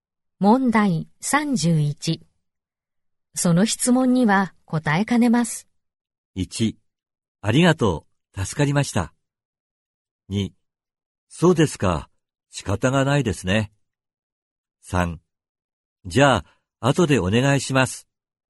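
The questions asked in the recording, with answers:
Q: その質問には答えかねます。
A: 2: そうですか、仕方がないですね。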